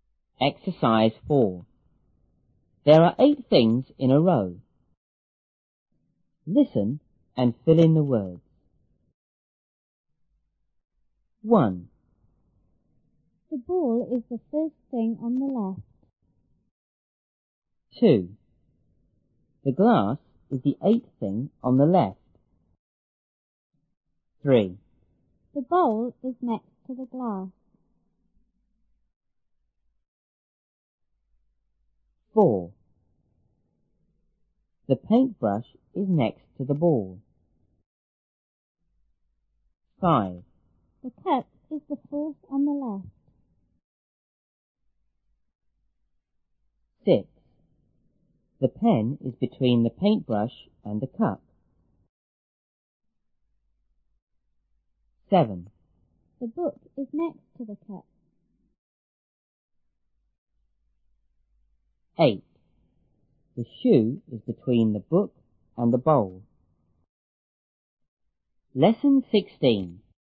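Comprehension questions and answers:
Listen and fill in the words.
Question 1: The ball is___ ___thing___the left.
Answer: the first, on

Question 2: The glass is___ ___thing on the left.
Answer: the eighth

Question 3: The bowl is___ ___ the ___.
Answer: next to, glass

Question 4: The ___ ___ is next to the ___.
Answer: paint brush, ball

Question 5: The ___ is the fourth on the ___.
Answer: cup, left

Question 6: The pen is___the paint brush and the___.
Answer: between, cup

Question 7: The ___ is ___ ___ the cup.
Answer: book, next to

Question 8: The___is___the book and the___.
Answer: shoe, between, bowl

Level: 初中英语广州版1B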